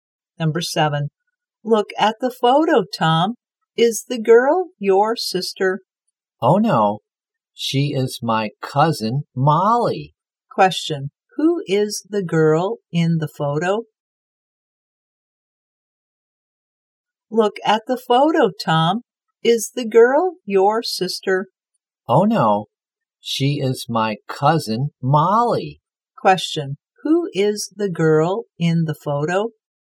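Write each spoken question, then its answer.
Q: who is the girl in the photo?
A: Tom's cousin, Molly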